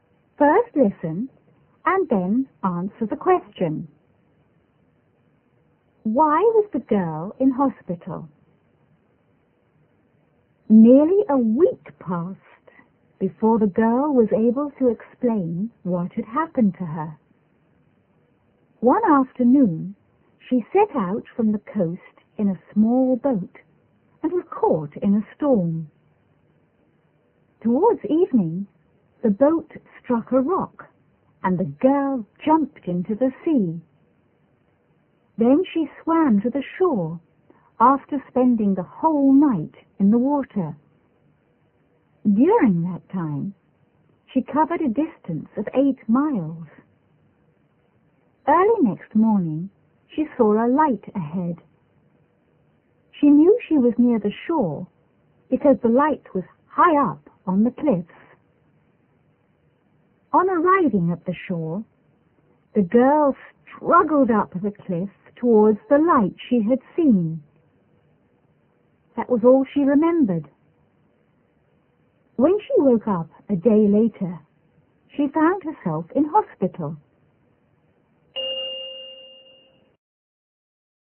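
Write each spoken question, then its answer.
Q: Why was the girl in hospital?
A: After her boat hit a rock in a storm, she swam all night to the shore, climbed the cliff and collapsed from exhaustion.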